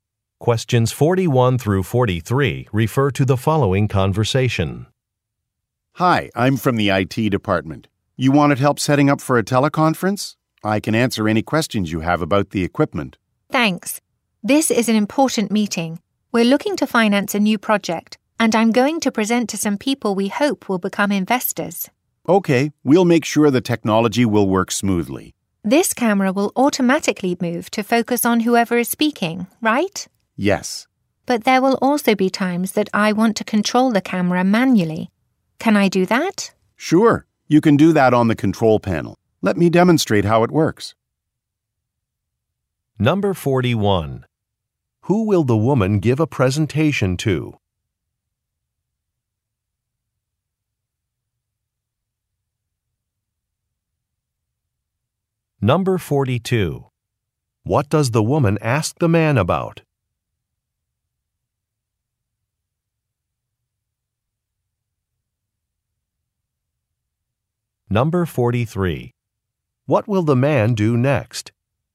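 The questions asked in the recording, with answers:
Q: Who will the woman give a presentation to?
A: Potential investors

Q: What does the woman ask the man about?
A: Controlling the camera manually

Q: What will the man do next?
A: Demonstrate how the control panel works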